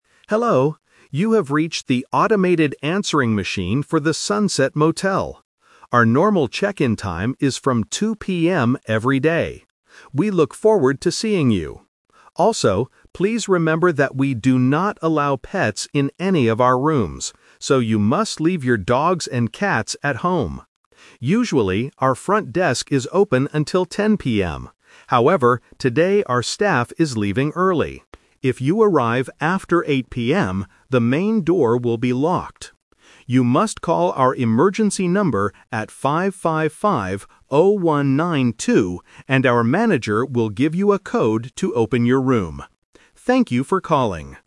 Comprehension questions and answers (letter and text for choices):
Listen to a recorded message on a motel's answering machine. Choose the correct answer (A, B, or C) for each question.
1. What time can guests start checking in?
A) At 8:00 PM.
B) At 10:00 PM.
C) At 2:00 PM.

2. What is the motel's rule about animals?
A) Guests cannot bring any pets.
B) Pets must stay outside the rooms.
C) Guests have to pay extra for dogs.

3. What must guests do if they arrive late tonight? (The Twist)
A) Wait until 10:00 PM for the door to open.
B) Call the emergency number to get a code.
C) Go to the manager's house to get a key.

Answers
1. C) At 2:00 PM.
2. A) Guests cannot bring any pets.
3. B) Call the emergency number to get a code.

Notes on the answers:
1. The message clearly states, "Our normal check-in time is from 2:00 PM every day." Trap: Options A and B are traps using other times mentioned in the audio (8:00 PM is the early closing time, and 10:00 PM is the normal closing time).
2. Option B and Option C are plausible rules for other hotels, but they are not mentioned in this audio. The motel strictly forbids pets.
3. This is the Twist. Guests might expect the desk to be open late, but today is different. The recording says, "If you arrive after 8:00 PM... You must call our emergency number... and our manager will give you a code..." Trap: Option A is a trap because 10:00 PM is when the desk usually closes, not when it opens. Option C is a trap using the word "manager", but guests just need to call the manager, not go to their house.

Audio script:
Answering Machine: Hello, you have reached the automated answering machine for the Sunset Motel. Our normal check-in time is from 2:00 PM every day. We look forward to seeing you. Also, please remember that we do not allow pets in any of our rooms, so you must leave your dogs and cats at home. Usually, our front desk is open until 10:00 PM. However, today our staff is leaving early. If you arrive after 8:00 PM, the main door will be locked. You must call our emergency number at 555-0192, and our manager will give you a code to open your room. Thank you for calling!